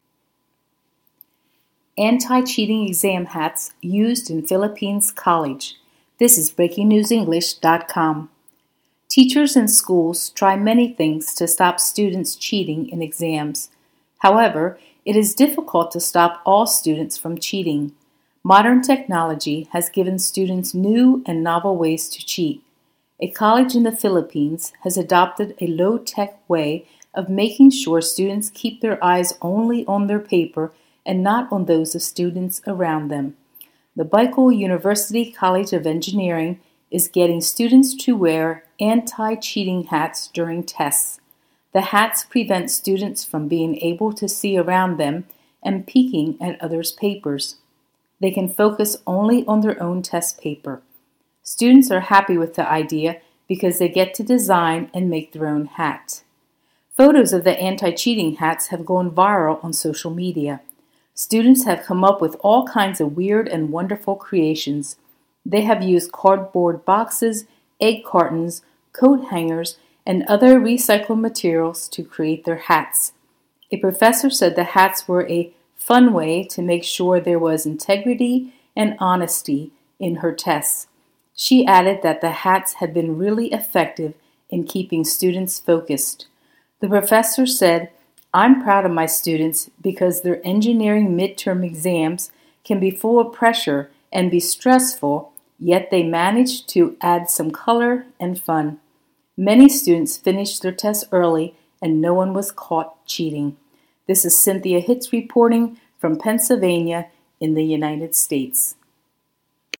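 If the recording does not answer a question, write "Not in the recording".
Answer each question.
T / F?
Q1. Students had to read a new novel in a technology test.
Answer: F

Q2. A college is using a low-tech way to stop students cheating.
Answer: T

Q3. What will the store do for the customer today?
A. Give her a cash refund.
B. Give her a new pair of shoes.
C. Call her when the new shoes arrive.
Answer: Not in the recording

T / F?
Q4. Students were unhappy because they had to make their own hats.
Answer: F

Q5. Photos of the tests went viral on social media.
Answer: F

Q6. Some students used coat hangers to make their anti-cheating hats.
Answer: T

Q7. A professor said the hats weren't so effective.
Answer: F

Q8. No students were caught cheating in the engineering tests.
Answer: T

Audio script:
Anti-cheating exam hats used in Philippines college
Teachers and schools try many things to stop students cheating in exams. 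However, it is difficult to stop all students from cheating. Modern technology has given students new and novel ways to cheat. A college in the Philippines has adopted a low-tech way of making sure students keep their eyes only on their paper and not on those of students' around them. The Bicol University College of Engineering is getting students to wear anti-cheating hats during tests. The hats prevent students from being able to see around them and peeking at others' papers. They can focus only on their own test paper. Students are happy with the idea because they get to design and make their own hat.
Photos of the anti-cheating hats have gone viral on social media. Students have come up with all kinds of weird and wonderful creations. They have used cardboard boxes, egg cartons, coat hangers and other recycled materials to create their hats. A professor said the hats were a "fun way" to make sure there was "integrity and honesty" in her tests. 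She added that the hats had been "really effective" in keeping students focused. The professor said: "I'm proud of my students because their engineering mid-term exams can be full of pressure and be stressful, yet they managed to add some colour and fun." Many students finished their tests early and no one was caught cheating.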